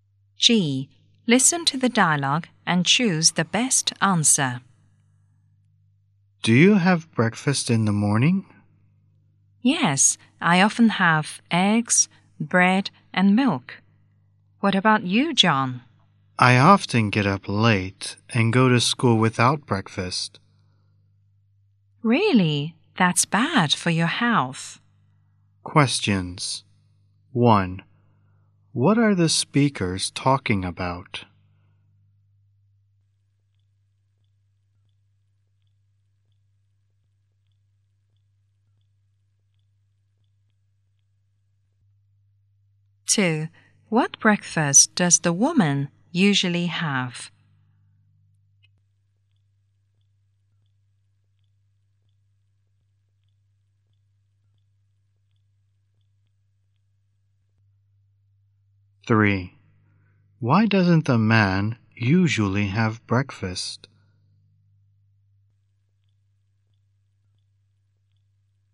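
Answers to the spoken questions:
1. Breakfast
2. Eggs, bread and milk
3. He often gets up late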